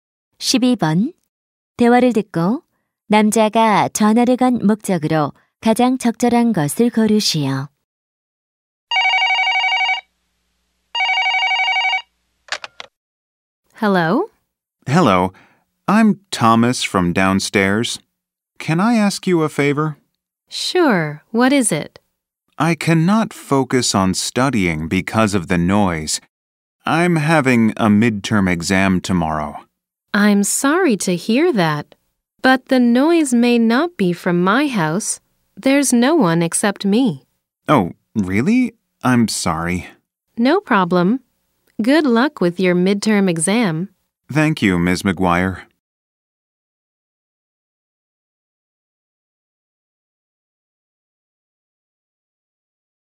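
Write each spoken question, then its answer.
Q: 대화를 듣고 남자가 전화를 건 목적으로 가장 적절한 것을 고르시오.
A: 소음에 대해 항의하려고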